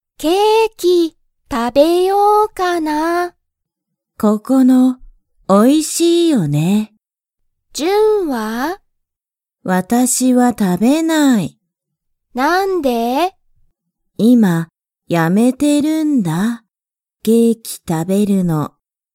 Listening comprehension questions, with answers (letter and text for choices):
ジュンはケーキを食(た)べますか?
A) はい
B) いいえ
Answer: B) いいえ